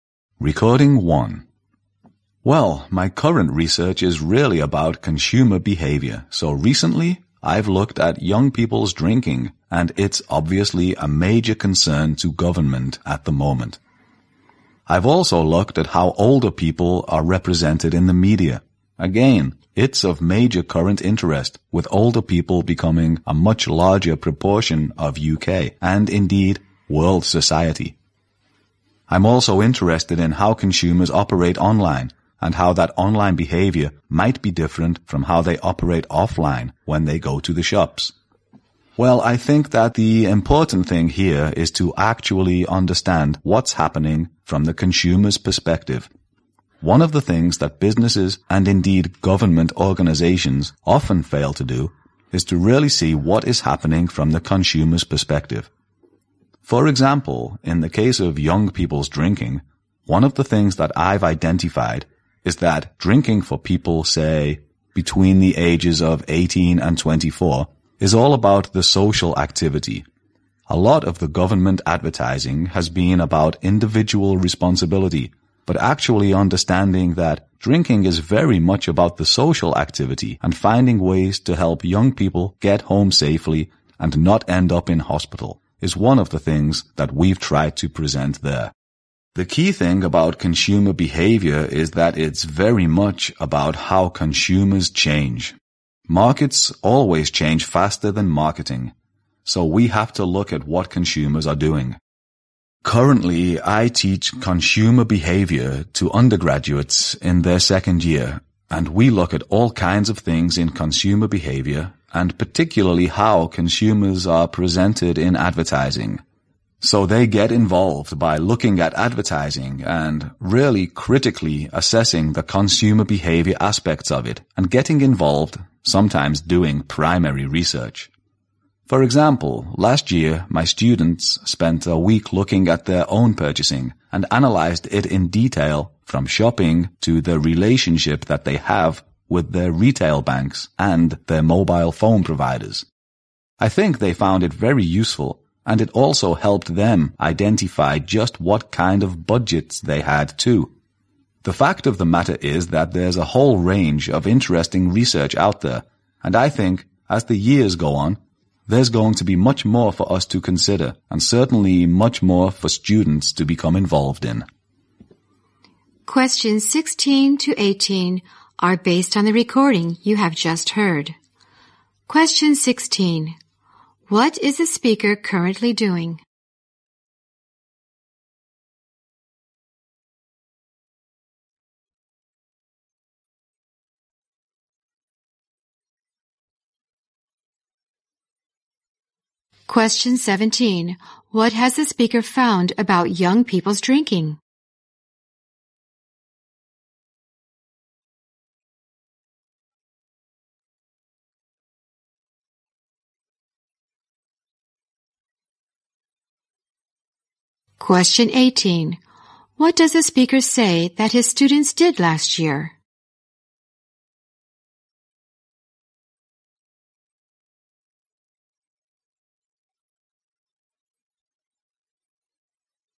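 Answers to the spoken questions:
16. Research on consumer behavior
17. It is all about the social activity
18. They spent a week analyzing their own purchasing in detail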